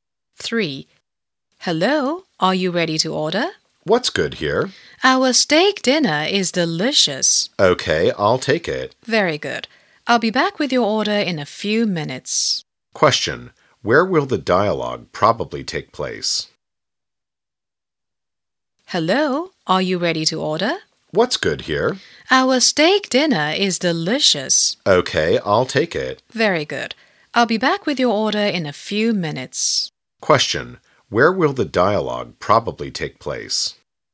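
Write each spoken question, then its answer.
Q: Where will the dialogue probably take place?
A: In a restaurant.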